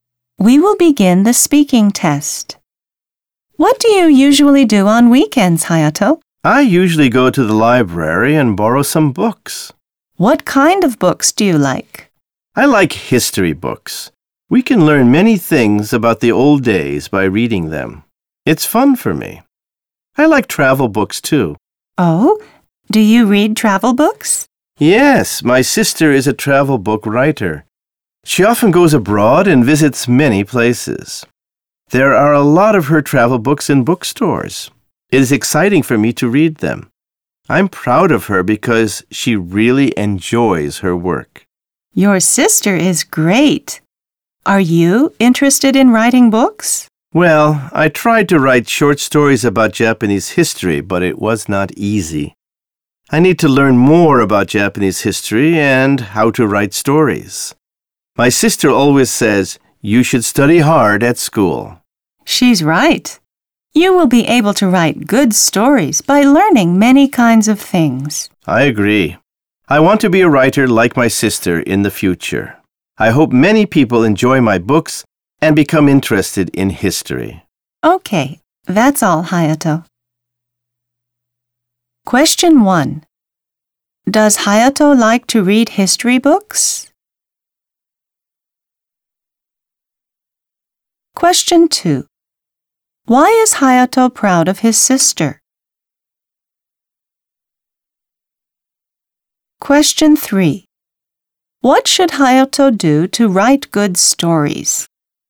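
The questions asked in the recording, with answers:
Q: Does Hayato like to read history books?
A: Yes, he does.

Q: Why is Hayato proud of his sister?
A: Because she really enjoys her work.

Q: What should Hayato do to write good stories?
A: Study hard at school and learn many kinds of things.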